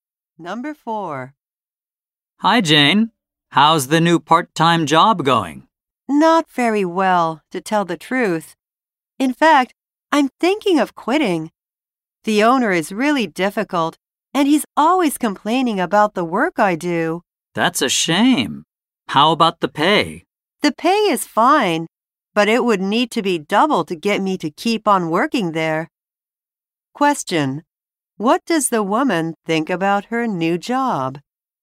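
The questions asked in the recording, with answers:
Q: What does the woman think about her new job?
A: The owner is difficult, and she is thinking of quitting.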